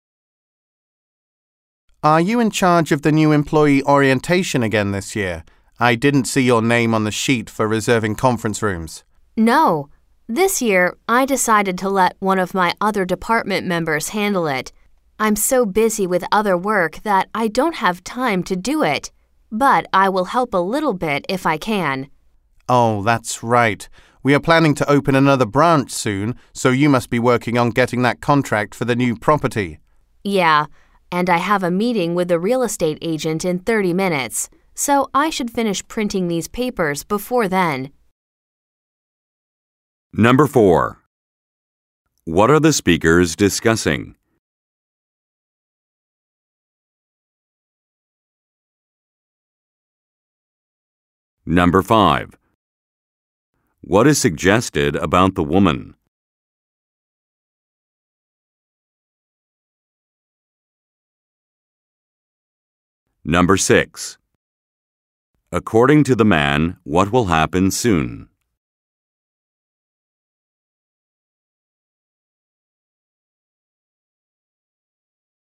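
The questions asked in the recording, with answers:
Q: What are the speakers discussing?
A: The new employee orientation

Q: According to the man, what will happen soon?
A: The company will open another branch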